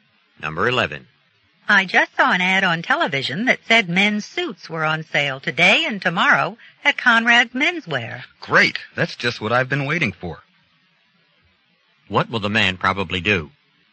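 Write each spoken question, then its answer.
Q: What will the man probably do?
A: Go to Conrad Menswear to buy a suit on sale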